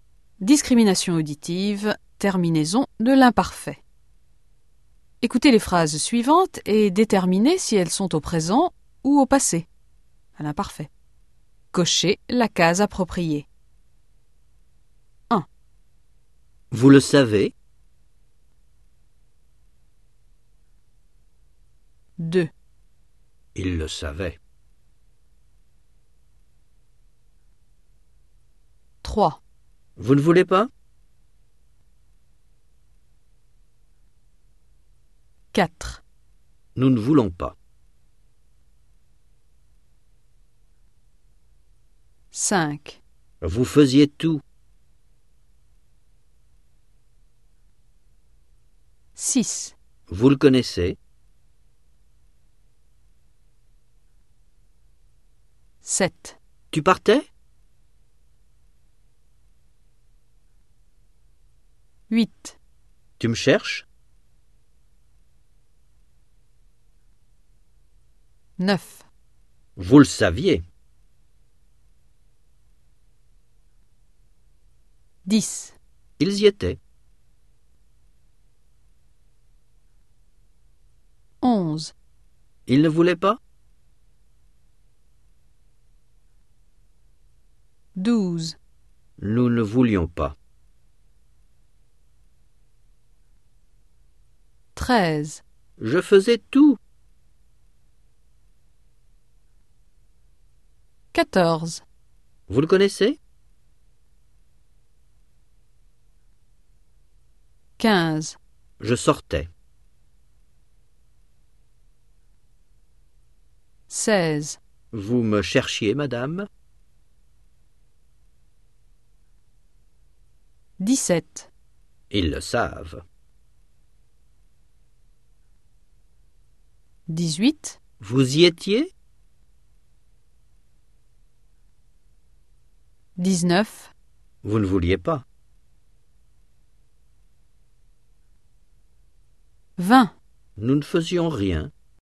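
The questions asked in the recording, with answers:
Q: Vous le savez.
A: présent

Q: Il le savait.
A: imparfait

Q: Vous ne voulez pas?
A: présent

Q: Nous ne voulons pas.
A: présent

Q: Vous faisiez tout.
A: imparfait

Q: Vous le connaissez.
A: présent

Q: Tu partais?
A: imparfait

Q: Tu me cherches?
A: présent

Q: Vous le saviez.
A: imparfait

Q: Ils y étaient.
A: imparfait

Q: Ils ne voulaient pas?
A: imparfait

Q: Nous ne voulions pas.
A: imparfait

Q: Je faisais tout.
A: imparfait

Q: Vous le connaissez?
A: présent

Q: Je sortais.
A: imparfait

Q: Vous me cherchiez, madame?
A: imparfait

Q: Ils le savent.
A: présent

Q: Vous y étiez?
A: imparfait

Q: Vous ne vouliez pas.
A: imparfait

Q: Nous ne faisions rien.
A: imparfait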